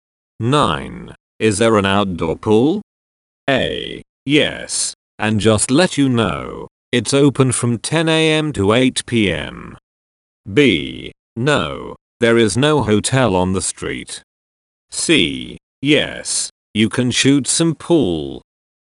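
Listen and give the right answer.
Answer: A: Yes, and just let you know, it's open from 10 a.m. to 8 p.m.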